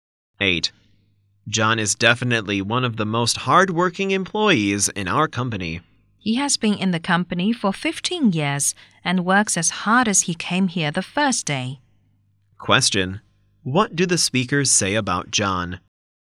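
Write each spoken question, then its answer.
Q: What do the speakers say about John?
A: He is very hard-working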